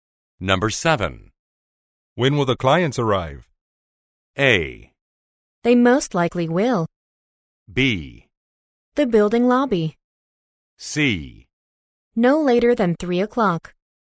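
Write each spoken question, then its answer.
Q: When will the clients arrive?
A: C: No later than 3 o'clock.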